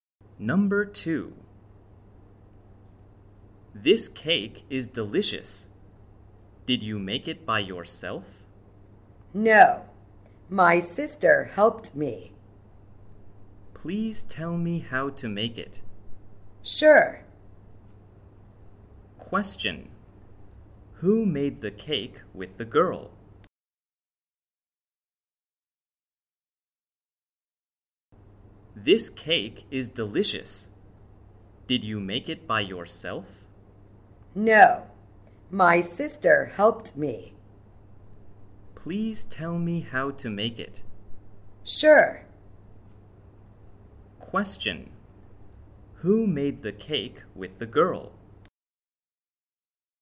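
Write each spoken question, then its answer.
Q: Who made the cake with the girl?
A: Her sister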